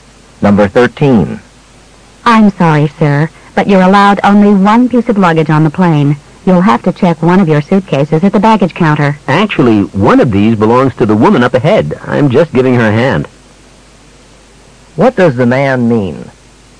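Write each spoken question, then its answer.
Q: What does the man mean?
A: Only one of the suitcases is his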